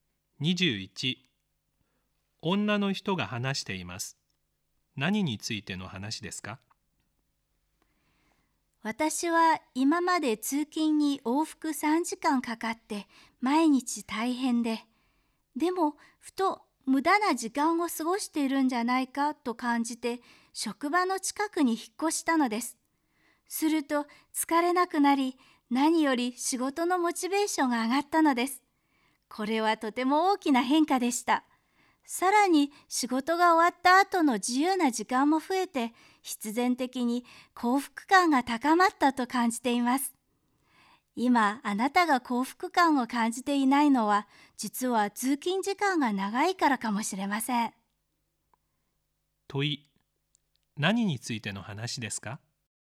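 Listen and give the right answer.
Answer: 通勤時間と幸福感の関係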